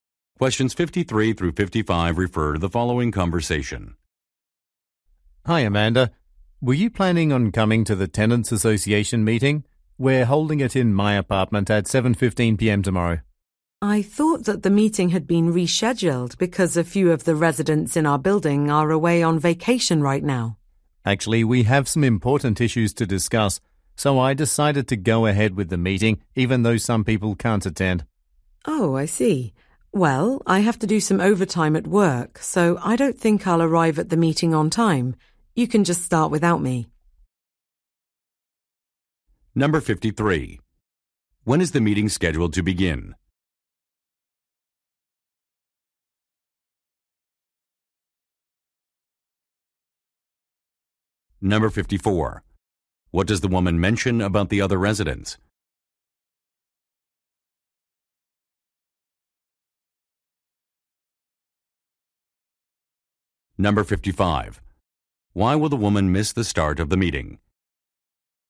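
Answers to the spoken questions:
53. At 7:15 p.m. tomorrow
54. Some are away on vacation
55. She has to work overtime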